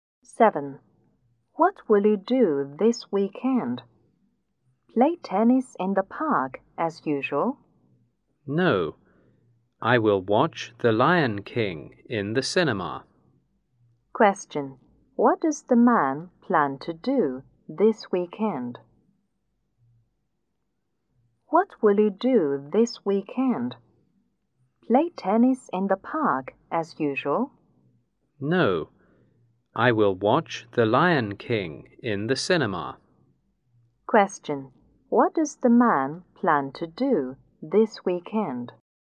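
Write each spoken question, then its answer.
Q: What does the man plan to do this weekend?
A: Watch The Lion King in the cinema.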